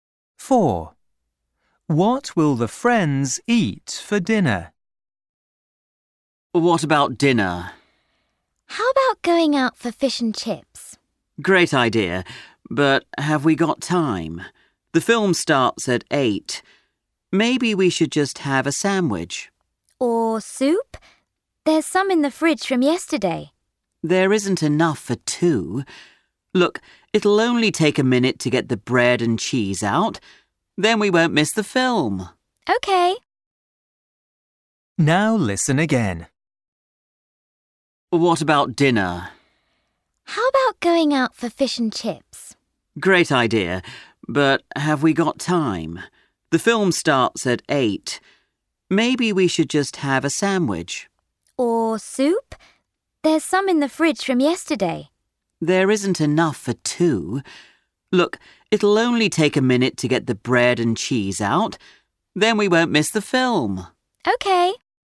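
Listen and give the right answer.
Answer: sandwiches (bread and cheese)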